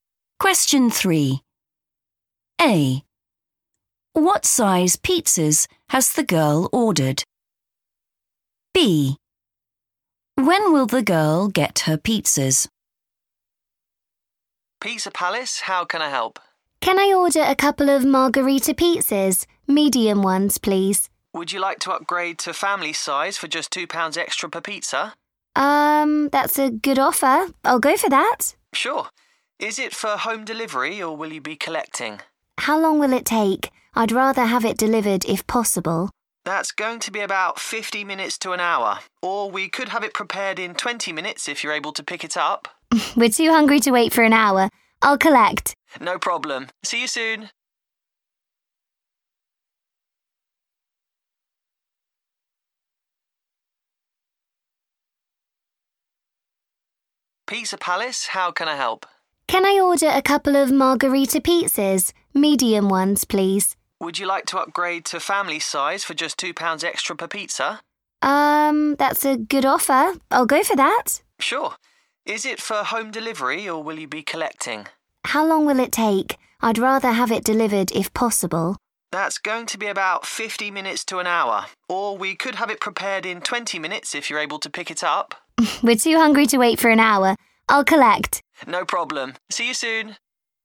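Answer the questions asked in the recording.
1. family size
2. in 20 minutes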